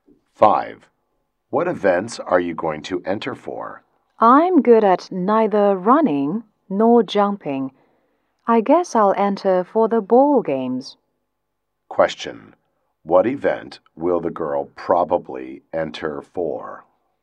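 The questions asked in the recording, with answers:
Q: What event will the girl probably enter for?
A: The ball games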